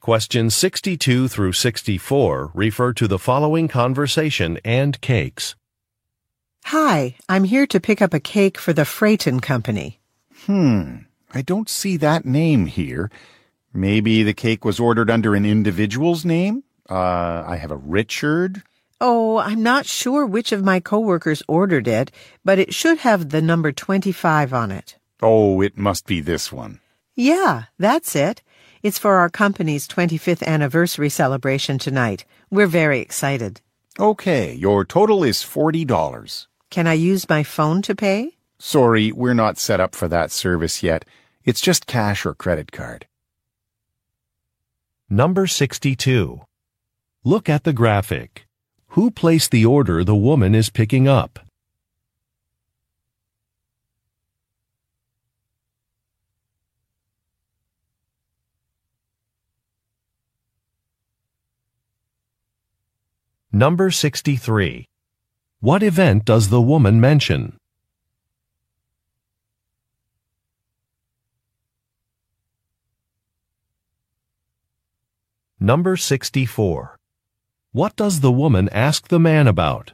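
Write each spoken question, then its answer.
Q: What event does the woman mention?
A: Her company's 25th anniversary celebration

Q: What does the woman ask the man about?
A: Whether she can pay with her phone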